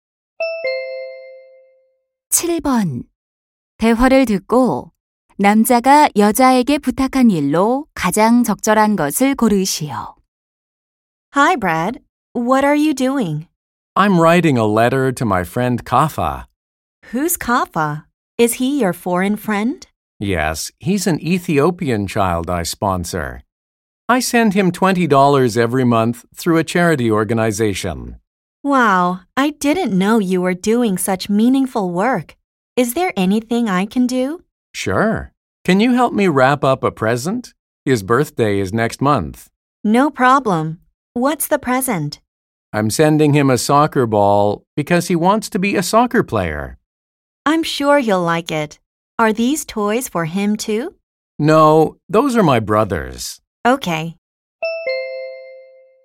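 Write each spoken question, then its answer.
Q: 대화를 듣고 남자가 여자에게 부탁한 일로 가장 적절한 것을 고르시오.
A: 선물 포장 도와주기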